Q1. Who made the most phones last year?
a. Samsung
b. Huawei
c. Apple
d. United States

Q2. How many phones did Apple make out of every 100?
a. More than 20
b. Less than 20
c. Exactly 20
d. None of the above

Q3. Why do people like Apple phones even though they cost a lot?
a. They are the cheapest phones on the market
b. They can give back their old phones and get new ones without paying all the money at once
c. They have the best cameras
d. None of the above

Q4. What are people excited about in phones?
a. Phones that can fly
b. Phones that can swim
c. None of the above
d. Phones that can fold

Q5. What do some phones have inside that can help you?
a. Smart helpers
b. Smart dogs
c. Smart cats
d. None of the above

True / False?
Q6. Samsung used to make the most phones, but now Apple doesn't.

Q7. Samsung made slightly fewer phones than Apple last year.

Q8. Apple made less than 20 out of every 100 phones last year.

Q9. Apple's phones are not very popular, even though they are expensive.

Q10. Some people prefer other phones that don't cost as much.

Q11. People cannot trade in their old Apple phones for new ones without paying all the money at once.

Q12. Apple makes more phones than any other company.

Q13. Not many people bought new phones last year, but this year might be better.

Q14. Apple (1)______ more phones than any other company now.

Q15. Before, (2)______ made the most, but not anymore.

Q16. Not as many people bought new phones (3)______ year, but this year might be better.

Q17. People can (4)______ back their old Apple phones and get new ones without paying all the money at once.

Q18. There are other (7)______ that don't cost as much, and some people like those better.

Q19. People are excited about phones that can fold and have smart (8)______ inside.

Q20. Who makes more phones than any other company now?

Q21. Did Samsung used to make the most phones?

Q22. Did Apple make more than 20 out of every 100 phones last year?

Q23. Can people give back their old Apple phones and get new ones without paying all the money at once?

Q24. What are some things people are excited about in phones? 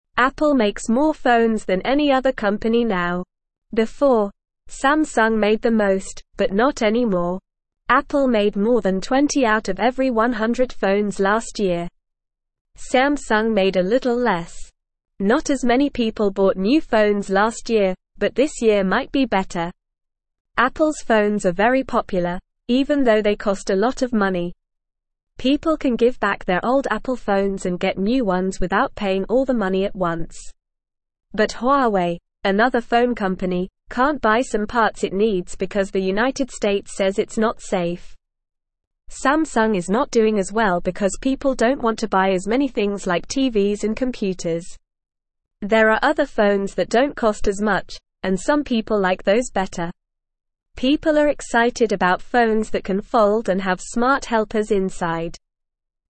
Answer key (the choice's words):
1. Apple
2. More than 20
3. They can give back their old phones and get new ones without paying all the money at once
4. Phones that can fold
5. Smart helpers
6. False
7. True
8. False
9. False
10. True
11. False
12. True
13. True
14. makes
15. Samsung
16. last
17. give
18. phones
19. helpers
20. Apple makes more phones than any other company now.
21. Yes, Samsung used to make the most phones.
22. Yes, Apple made more than 20 out of every 100 phones last year.
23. Yes, people can give back their old Apple phones and get new ones without paying all the money at once.
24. People are excited about phones that can fold and have smart helpers inside.

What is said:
Apple makes more phones than any other company now. Before, Samsung made the most, but not anymore. Apple made more than 20 out of every 100 phones last year. Samsung made a little less. Not as many people bought new phones last year, but this year might be better.
Apple's phones are very popular, even though they cost a lot of money. People can give back their old Apple phones and get new ones without paying all the money at once. But Huawei, another phone company, can't buy some parts it needs because the United States says it's not safe. Samsung is not doing as well because people don't want to buy as many things like TVs and computers. There are other phones that don't cost as much, and some people like those better. People are excited about phones that can fold and have smart helpers inside.

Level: Level 1